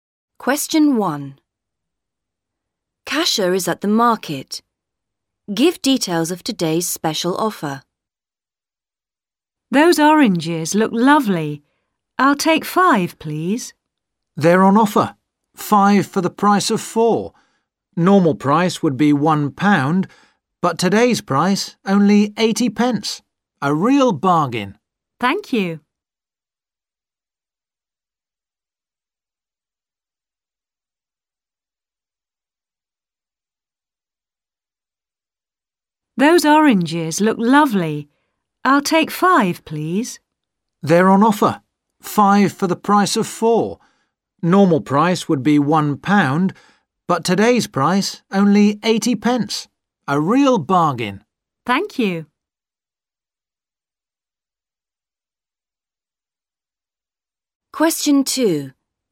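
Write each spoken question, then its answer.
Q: Give details of today's special offer.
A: Oranges: 5 for the price of 4 (80 pence instead of £1)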